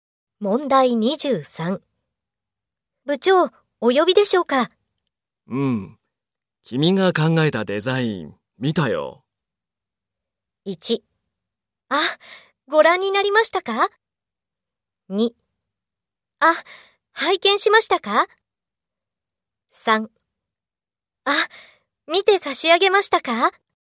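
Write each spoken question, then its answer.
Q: 部長、お呼びでしょうか?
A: 1: あ、ご覧になりましたか?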